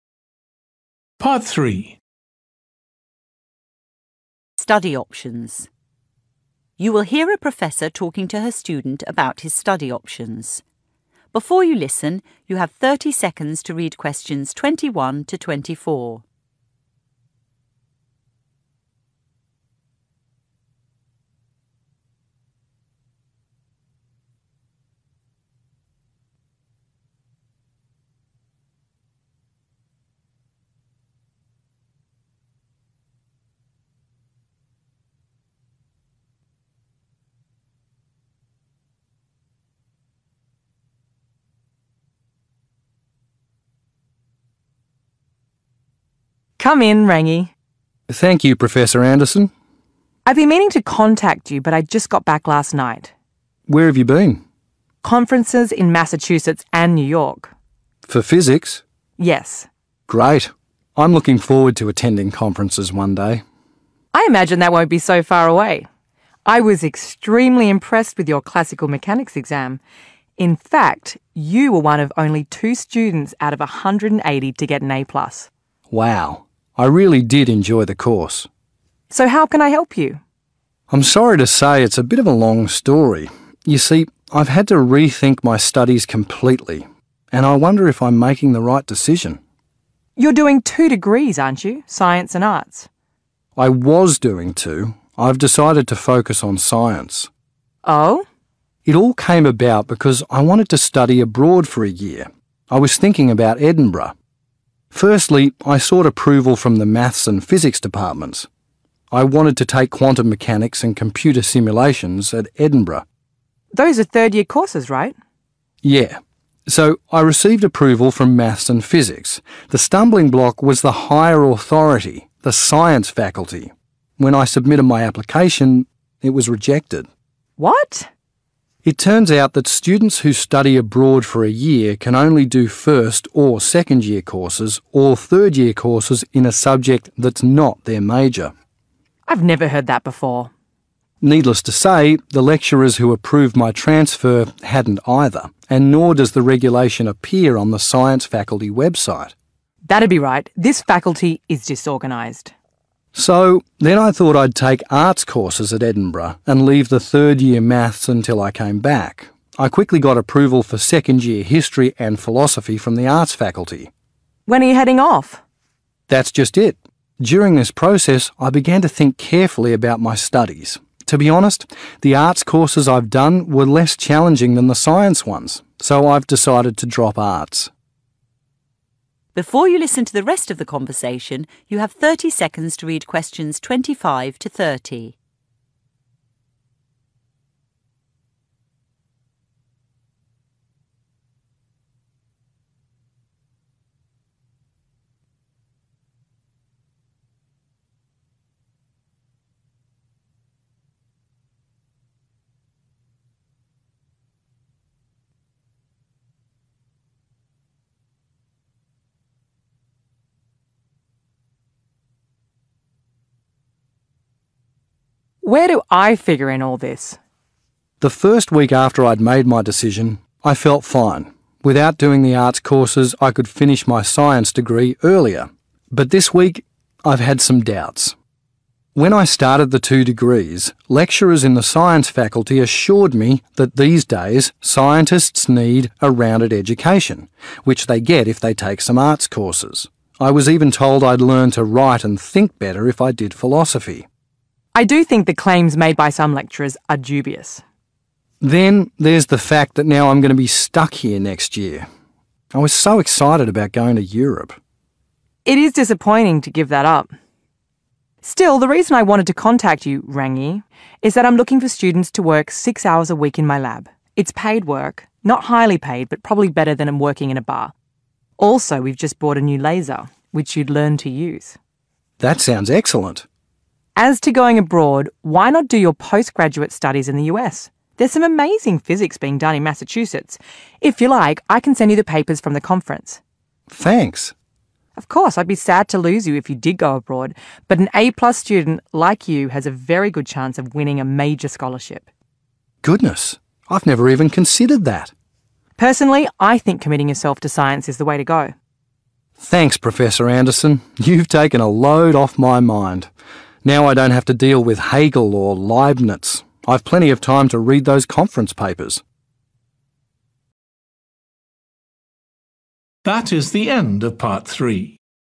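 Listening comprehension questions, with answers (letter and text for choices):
Choose the correct letter, A, B or C.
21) What was the Professor attending in Massachusetts and New York?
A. Physics Conferences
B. Physics Class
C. Mechanics Conferences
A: A. Physics Conferences

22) What mark did Rangi receive for Classical Mechanics?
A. C plus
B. A plus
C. B plus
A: B. A plus

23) Which degree has Rangi decided to abandon?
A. Math and Physics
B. Science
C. Arts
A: C. Arts

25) Benefit of Rangi's decision is that he will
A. finish his degree earlier.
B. receive higher marks.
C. improve his writing style.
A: A. finish his degree earlier.

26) The Professor thinks the claims of some lecturers are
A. critical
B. doubtful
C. boastful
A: B. doubtful

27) Rangi is disappointed because he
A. will have to work in a bar again.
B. cannot afford to study abroad.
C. will not be going to Europe.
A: C. 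will not be going to Europe.

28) The Professor offers Rangi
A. a part-time job in his lab.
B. supervision of his master's degree.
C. help with his laser experiments.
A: A. a part-time job in his lab.

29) In the Professor's opinion, Rangi is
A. quite likely to win a scholarship.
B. not so likely to win a scholarship.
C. highly likely to win a scholarship.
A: C. highly likely to win a scholarship.

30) What did Rangi feel by the end of the conversation?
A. thrilled but nervous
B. relieved and grateful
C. a little apprehensive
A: B. relieved and grateful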